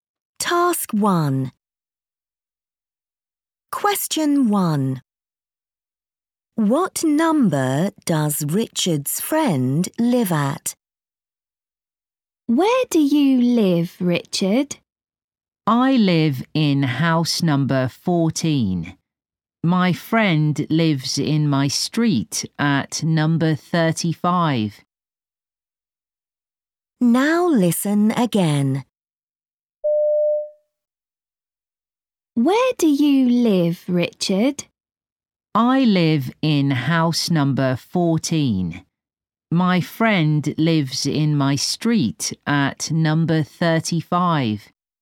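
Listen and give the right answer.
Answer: 35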